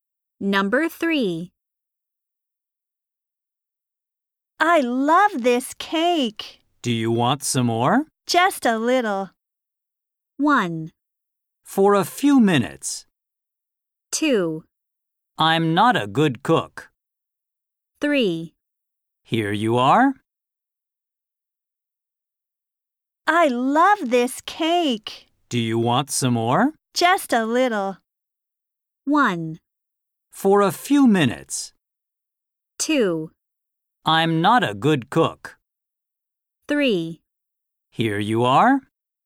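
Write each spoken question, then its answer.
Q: Just a little.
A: 3: Here you are.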